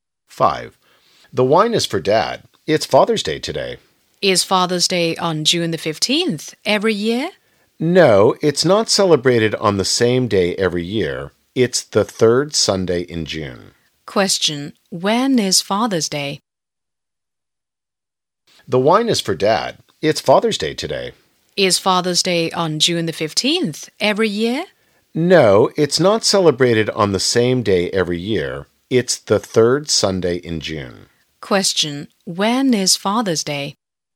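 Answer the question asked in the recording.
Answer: The third Sunday in June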